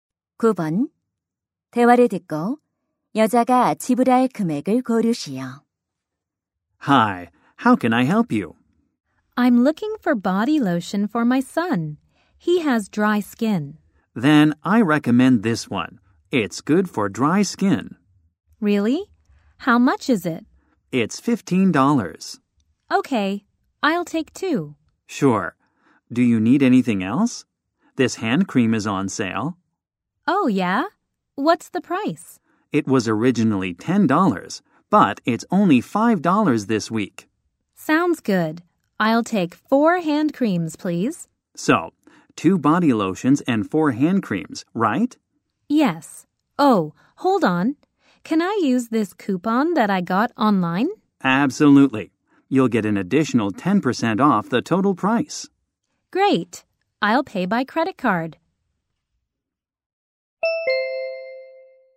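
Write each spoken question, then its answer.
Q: 대화를 듣고 여자가 지불할 금액을 고르시오.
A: $45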